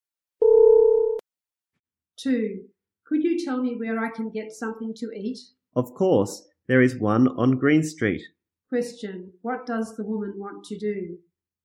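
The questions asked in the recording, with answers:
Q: Question, what does the woman want to do?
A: Get something to eat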